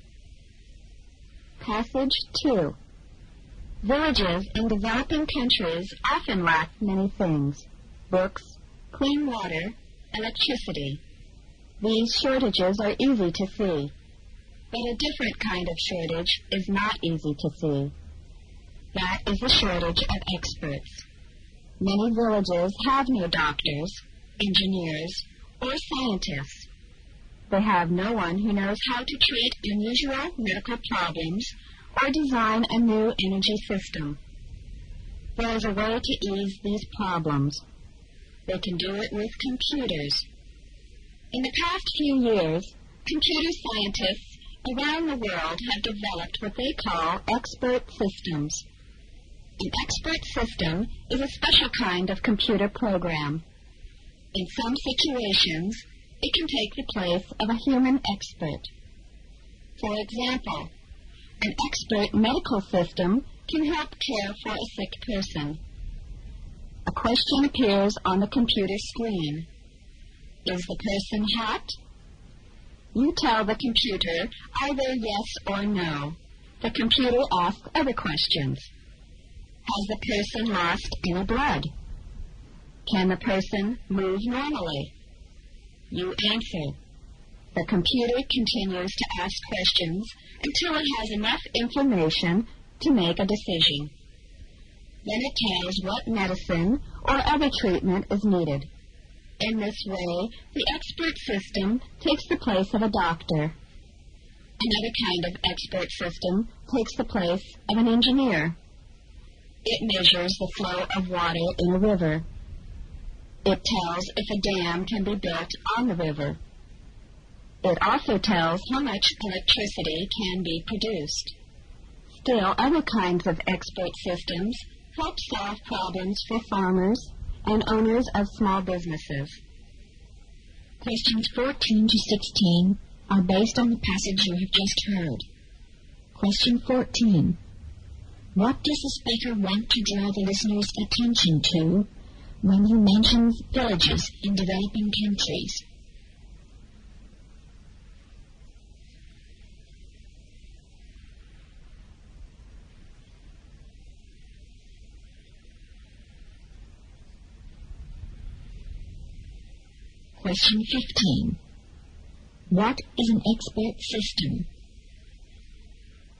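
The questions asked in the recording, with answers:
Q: What does the speaker want to draw the listener's attention to when he mentions villages in developing countries?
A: The shortage of experts

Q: What is an expert system?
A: A special kind of computer program that can take the place of a human expert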